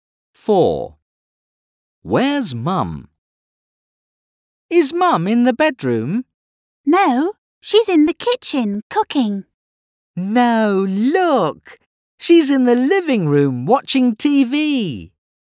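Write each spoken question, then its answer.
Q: Where's Mum?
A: In the living room watching TV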